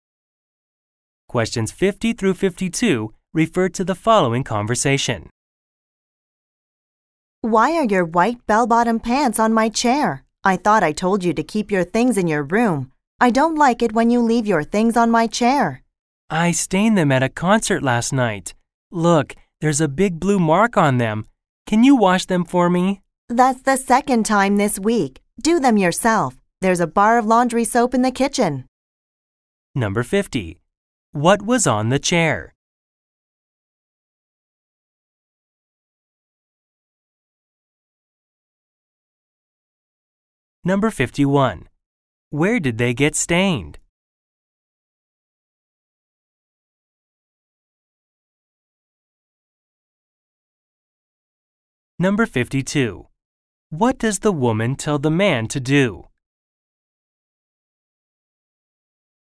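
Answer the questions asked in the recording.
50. White bell-bottom pants
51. At a concert
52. Wash them himself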